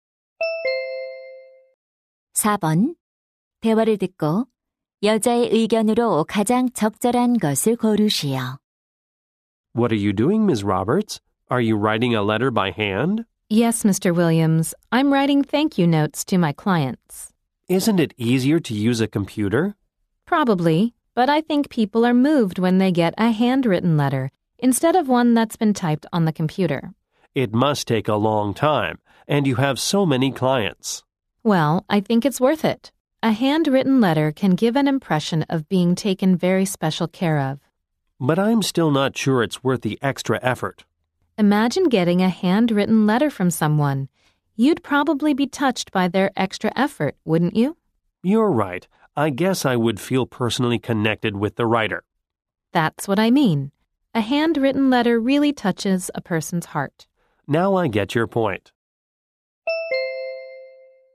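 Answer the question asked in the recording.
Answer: 손으로 쓴 편지는 사람의 마음을 감동시킨다.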